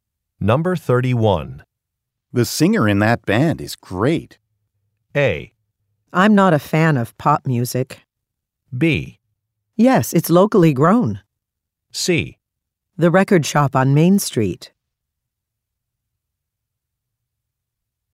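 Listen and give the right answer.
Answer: A: I'm not a fan of pop music.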